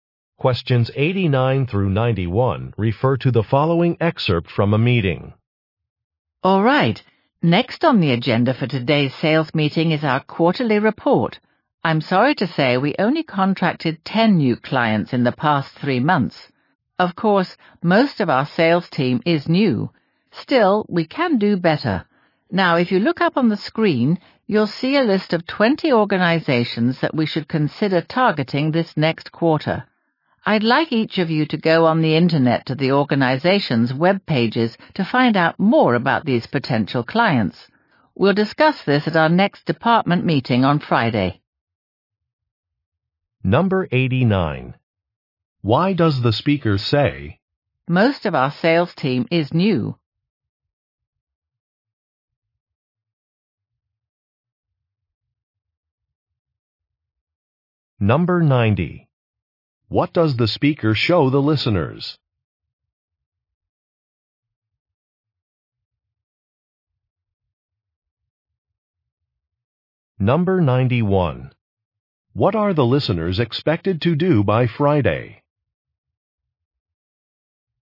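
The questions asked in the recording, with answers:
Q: What does the speaker show the listeners?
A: A list of 20 potential client organizations

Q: What are the listeners expected to do by Friday?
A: Research the organizations' web pages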